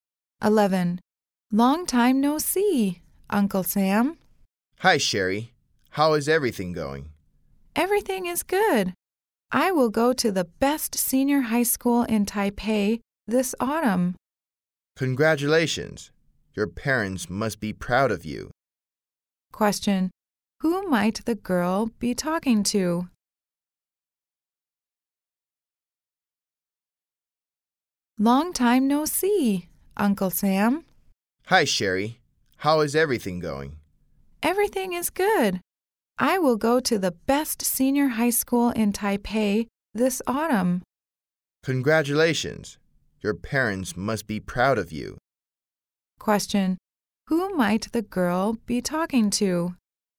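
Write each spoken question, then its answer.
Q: Question. Who might the girl be talking to?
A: Her uncle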